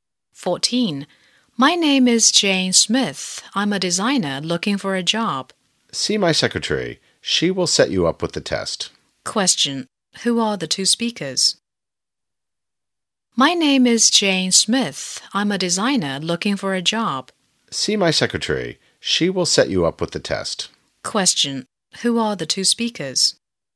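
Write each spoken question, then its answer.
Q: Who are the two speakers?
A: A job applicant and an employer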